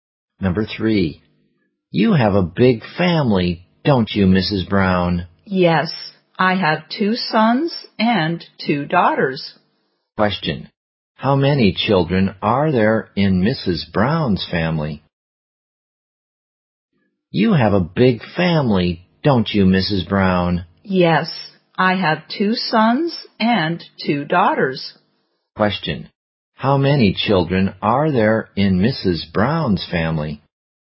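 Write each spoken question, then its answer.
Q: Question, how many children are there in Mrs. Brown's family?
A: Four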